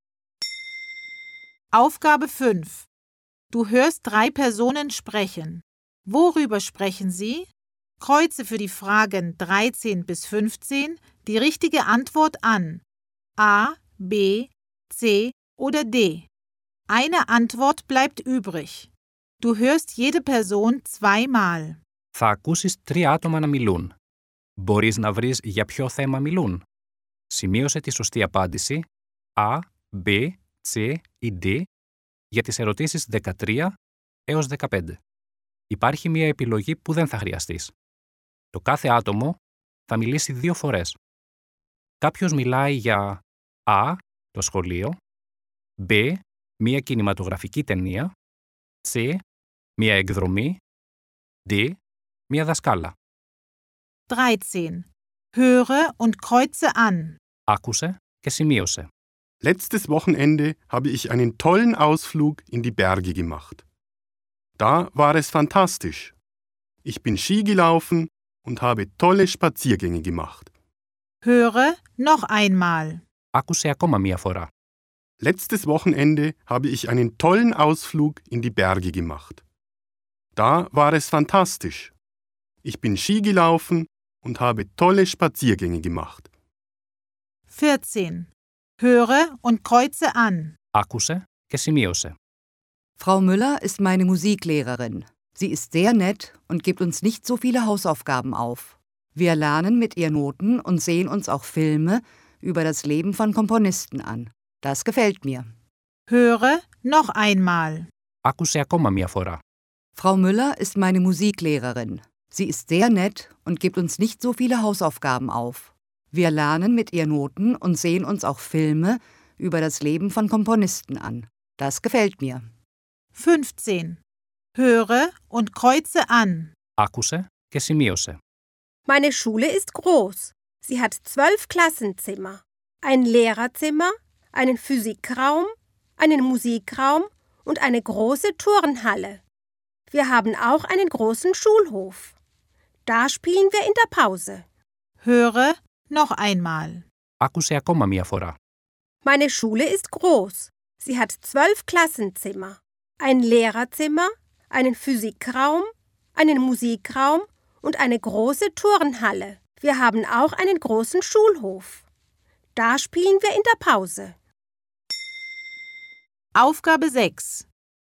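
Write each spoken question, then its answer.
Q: Worüber sprechen Sie?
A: C: eine Ausflug / μία εκδρομή

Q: Worüber sprechen Sie?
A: D: eine Lehrerin / μία δασκάλα

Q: Worüber sprechen Sie?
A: A: die Schule / το σχολείο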